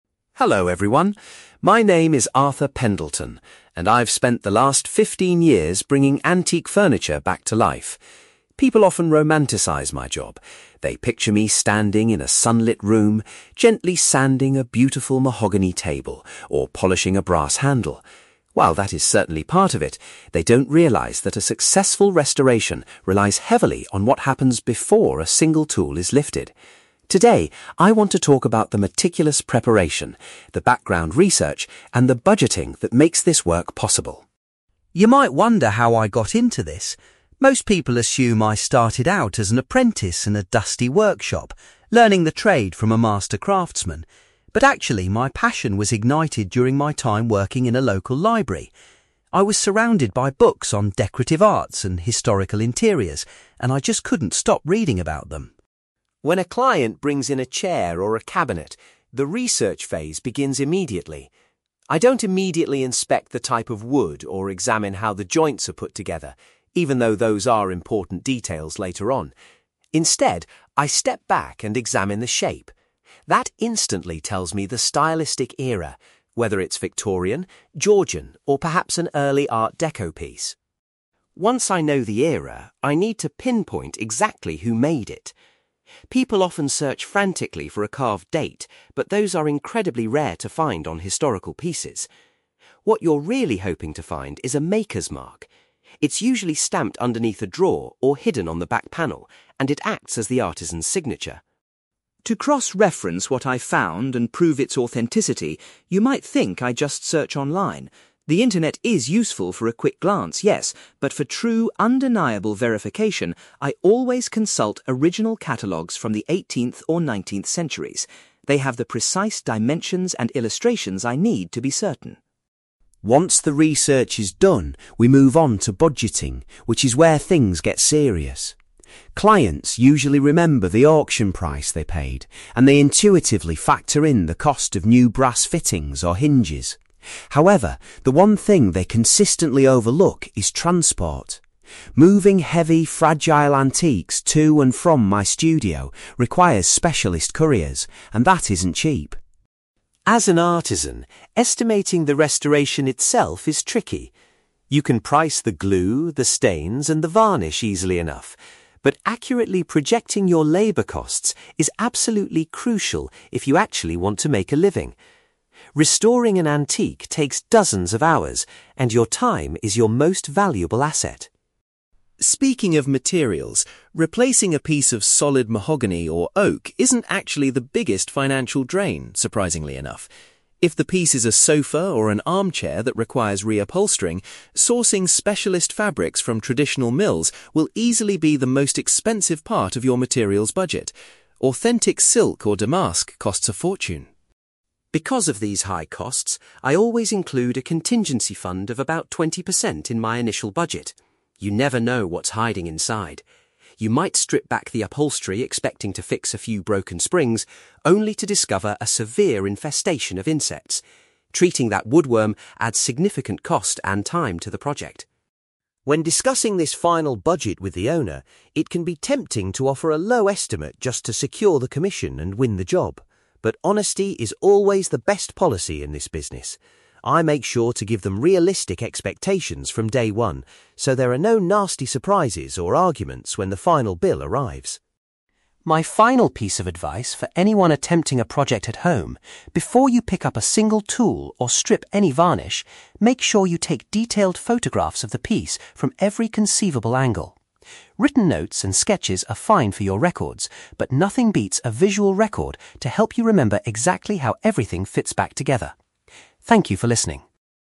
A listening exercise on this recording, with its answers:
For questions 9-18, complete the sentences with a word or short phrase.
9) Arthur developed his initial interest in antiques while he was employed at a (9)........................... .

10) Arthur says that examining a piece's (10)........................... is his first step to identify its historical period.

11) Arthur explains that finding a (11)........................... is much more common than finding a date on old furniture.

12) Arthur prefers to use (12)........................... rather than the internet to verify a piece's authenticity.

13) According to Arthur, clients frequently forget to include the cost of (13)........................... in their budget.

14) Arthur believes it is vital to estimate (14)........................... accurately so the artisan doesn't lose money.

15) Arthur points out that buying (15)........................... can be the most expensive material cost in a restoration project.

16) Arthur sets aside emergency money in case he discovers (16)........................... inside the antique.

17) Arthur stresses the importance of providing clients with (17)........................... regarding the final cost and timeline.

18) Arthur recommends taking (18)........................... before beginning any physical restoration work.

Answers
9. library
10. shape
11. maker's mark
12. original catalogues
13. transport
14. labour costs
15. specialist fabrics
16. insects
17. realistic expectations
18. detailed photographs

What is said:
Arthur Pendelton: Hello everyone. My name is Arthur Pendelton, and I've spent the last fifteen years bringing antique furniture back to life. People often romanticize my job. They picture me standing in a sunlit room, gently sanding a beautiful mahogany table or polishing a brass handle. While that is certainly part of it, they don't realize that a successful restoration relies heavily on what happens before a single tool is lifted. Today, I want to talk about the meticulous preparation, the background research, and the budgeting that makes this work possible.
You might wonder how I got into this. Most people assume I started out as an apprentice in a dusty workshop, learning the trade from a master craftsman. But actually, my passion was ignited during my time working in a local library. I was surrounded by books on decorative arts and historical interiors, and I just couldn't stop reading about them.
When a client brings in a chair or a cabinet, the research phase begins immediately. I don't immediately inspect the type of wood or examine how the joints are put together, even though those are important details later on. Instead, I step back and examine the shape. That instantly tells me the stylistic era—whether it's Victorian, Georgian, or perhaps an early Art Deco piece.
Once I know the era, I need to pinpoint exactly who made it. People often search frantically for a carved date, but those are incredibly rare to find on historical pieces. What you're really hoping to find is a maker's mark. It's usually stamped underneath a drawer or hidden on the back panel, and it acts as the artisan's signature.
To cross-reference what I've found and prove its authenticity, you might think I just search online. The internet is useful for a quick glance, yes, but for true, undeniable verification, I always consult original catalogues from the 18th or 19th centuries. They have the precise dimensions and illustrations I need to be certain.
Once the research is done, we move onto budgeting, which is where things get serious. Clients usually remember the auction price they paid, and they intuitively factor in the cost of new brass fittings or hinges. However, the one thing they consistently overlook is transport. Moving heavy, fragile antiques to and from my studio requires specialist couriers, and that isn't cheap.
As an artisan, estimating the restoration itself is tricky. You can price the glue, the stains, and the varnish easily enough. But accurately projecting your labour costs is absolutely crucial if you actually want to make a living. Restoring an antique takes dozens of hours, and your time is your most valuable asset.
Speaking of materials, replacing a piece of solid mahogany or oak isn't actually the biggest financial drain, surprisingly enough. If the piece is a sofa or an armchair that requires re-upholstering, sourcing specialist fabrics from traditional mills will easily be the most expensive part of your materials budget. Authentic silk or damask costs a fortune.
Because of these high costs, I always include a contingency fund of about twenty percent in my initial budget. You never know what's hiding inside. You might strip back the upholstery expecting to fix a few broken springs, only to discover a severe infestation of insects. Treating that woodworm adds significant cost and time to the project.
When discussing this final budget with the owner, it can be tempting to offer a low estimate just to secure the commission and win the job. But honesty is always the best policy in this business. I make sure to give them realistic expectations from day one, so there are no nasty surprises or arguments when the final bill arrives.
My final piece of advice for anyone attempting a project at home: before you pick up a single tool or strip any varnish, make sure you take detailed photographs of the piece from every conceivable angle. Written notes and sketches are fine for your records, but nothing beats a visual record to help you remember exactly how everything fits back together. Thank you for listening.

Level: B2